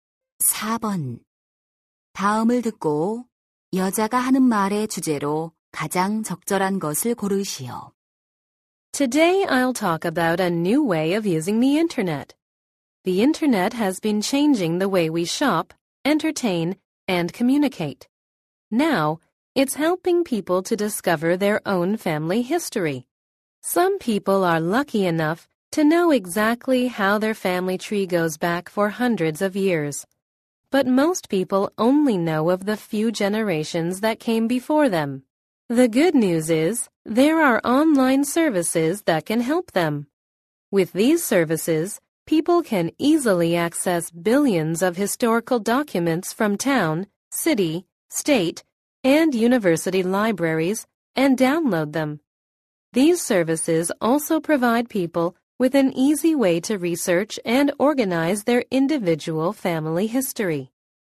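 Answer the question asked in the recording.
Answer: 인터넷 서비스를 이용한 가족사 조사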